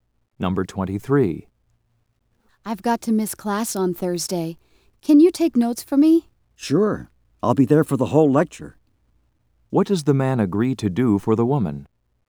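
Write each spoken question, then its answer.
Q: What does the man agree to do for the woman?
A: Take notes for her in Thursday's class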